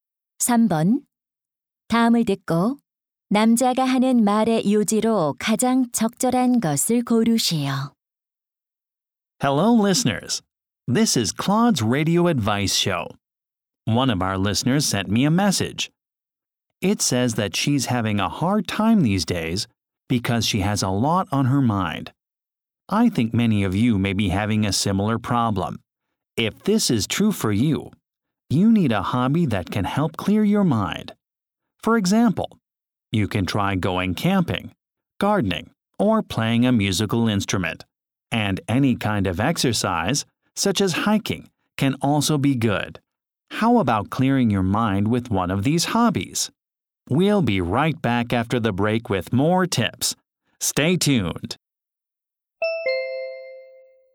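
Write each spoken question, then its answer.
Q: 다음을 듣고 남자가 하는 말의 요지로 가장 적절한 것을 고르시오.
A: 취미 활동은 머리를 맑게 하는 데 도움이 된다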